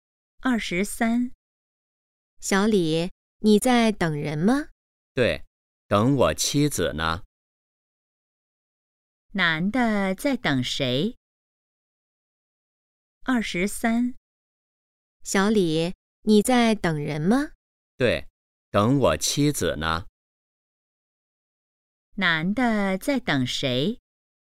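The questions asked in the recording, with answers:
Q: 男的在等谁?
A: 妻子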